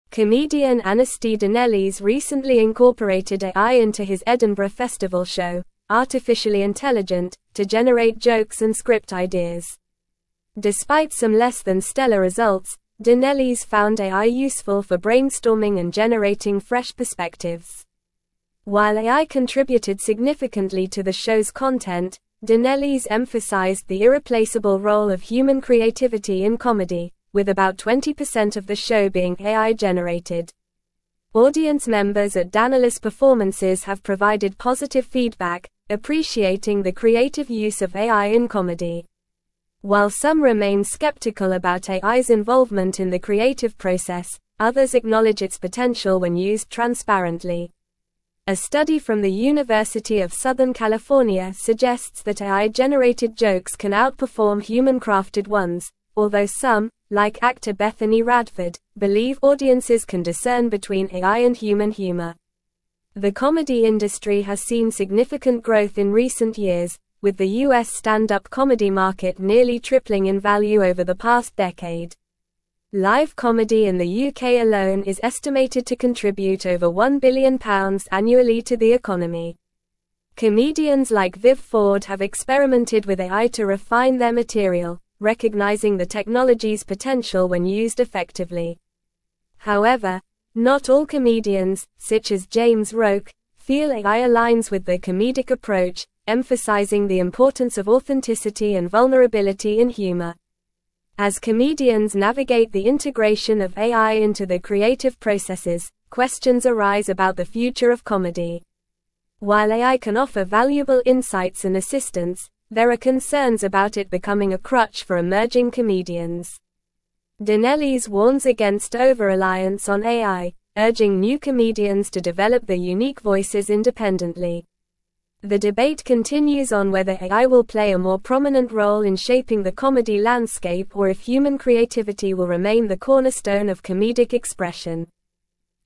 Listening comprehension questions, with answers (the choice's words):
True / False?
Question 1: Anesti Danelis integrated AI into his Edinburgh Festival show, "Artificially Intelligent," for generating jokes and script ideas.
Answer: True

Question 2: Audience members at Danelis' performances have generally responded positively to the use of AI in comedy.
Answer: True

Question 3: The US stand-up comedy market has doubled in value over the past decade.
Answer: False

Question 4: Approximately 10% of the content in Danelis' show was generated by AI.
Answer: False

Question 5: James Roque is one of the comedians who feel that AI does not align with their comedic approach.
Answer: True

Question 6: Live comedy in the UK contributes over £2 billion annually to the economy.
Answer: False

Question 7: An important question arising from the integration of AI into comedy is whether it will become a crutch for emerging comedians.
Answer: True

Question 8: Comedian Anesti Danelis recently incorporated AI into his (1)______ Festival show, "Artificially Intelligent," to generate jokes and script ideas.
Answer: Edinburgh

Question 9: Despite some less-than-stellar results, Danelis found AI (2)______ for (3)______ and generating fresh perspectives.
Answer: useful

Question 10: Despite some less-than-stellar results, Danelis found AI (2)______ for (3)______ and generating fresh perspectives.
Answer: brainstorming

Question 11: While AI (4)______ significantly to the show's content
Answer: contributed

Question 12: Audience members at Danelis' performances have provided positive feedback, (5)______ the (6)______ use of AI in comedy.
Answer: appreciating

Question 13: Audience members at Danelis' performances have provided positive feedback, (5)______ the (6)______ use of AI in comedy.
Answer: creative

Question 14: While some remain skeptical about AI's (7)______ in the creative process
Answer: involvement

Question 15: believe (8)______ can discern between AI and human humor.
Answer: audiences

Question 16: with the US stand-up comedy (9)______ nearly tripling in value over the past decade.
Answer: market

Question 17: Comedians like Viv Ford have (10)______ with AI to (11)______ their material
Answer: experimented

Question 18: Comedians like Viv Ford have (10)______ with AI to (11)______ their material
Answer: refine

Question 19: feel AI aligns with their comedic (12)______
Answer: approach

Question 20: questions arise about the future of (13)______.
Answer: comedy

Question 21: While AI can (14)______ valuable insights and assistance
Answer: offer

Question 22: (15)______ warns against overreliance on AI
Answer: Danelis

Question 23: The debate continues on whether AI will play a more prominent role in (16)______ the comedy landscape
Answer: shaping

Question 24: What was the name of the comedian who incorporated AI into his Edinburgh Festival show?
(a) Viv Ford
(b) James Roque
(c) Anesti Danelis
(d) Bethany Radford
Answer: Anesti Danelis

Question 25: How much of Anesti Danelis' show was AI-generated?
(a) 50%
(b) 75%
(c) 100%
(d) 20%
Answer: 20%

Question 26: According to a study from the University of Southern California, how do AI-generated jokes compare to human-crafted ones?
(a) Outperform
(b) Underperform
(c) Equal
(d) None of the above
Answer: Outperform

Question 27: How much has the US stand-up comedy market grown in the past decade?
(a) Doubled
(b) Nearly tripled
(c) Stayed the same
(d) Halved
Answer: Nearly tripled

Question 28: How much does live comedy in the UK contribute annually to the economy?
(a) Over £500 million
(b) Over £2 billion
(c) Over £5 billion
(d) Over £1 billion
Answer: Over £1 billion

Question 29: Who among the following believes that audiences can distinguish between AI and human humor?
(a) Anesti Danelis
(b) Viv Ford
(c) Bethany Radford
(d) James Roque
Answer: Bethany Radford

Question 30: What does Anesti Danelis warn new comedians against regarding AI?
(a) Underutilization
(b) Overreliance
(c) Ignoring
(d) Embracing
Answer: Overreliance

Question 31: What is emphasized by James Roque as important in humor, contrasting with the use of AI?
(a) Authenticity and vulnerability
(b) Artificial intelligence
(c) Timing and delivery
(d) Script structure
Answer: Authenticity and vulnerability

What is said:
Comedian Anesti Danelis recently incorporated AI into his Edinburgh Festival show, "Artificially Intelligent," to generate jokes and script ideas. Despite some less-than-stellar results, Danelis found AI useful for brainstorming and generating fresh perspectives. While AI contributed significantly to the show's content, Danelis emphasized the irreplaceable role of human creativity in comedy, with about 20% of the show being AI-generated.
Audience members at Danelis' performances have provided positive feedback, appreciating the creative use of AI in comedy. While some remain skeptical about AI's involvement in the creative process, others acknowledge its potential when used transparently. A study from the University of Southern California suggests that AI-generated jokes can outperform human-crafted ones, although some, like actor Bethany Radford, believe audiences can discern between AI and human humor.
The comedy industry has seen significant growth in recent years, with the US stand-up comedy market nearly tripling in value over the past decade. Live comedy in the UK alone is estimated to contribute over £1 billion annually to the economy. Comedians like Viv Ford have experimented with AI to refine their material, recognizing the technology's potential when used effectively. However, not all comedians, such as James Roque, feel AI aligns with their comedic approach, emphasizing the importance of authenticity and vulnerability in humor.
As comedians navigate the integration of AI into their creative processes, questions arise about the future of comedy. While AI can offer valuable insights and assistance, there are concerns about it becoming a crutch for emerging comedians. Danelis warns against overreliance on AI, urging new comedians to develop their unique voices independently. The debate continues on whether AI will play a more prominent role in shaping the comedy landscape or if human creativity will remain the cornerstone of comedic expression.

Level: Level 4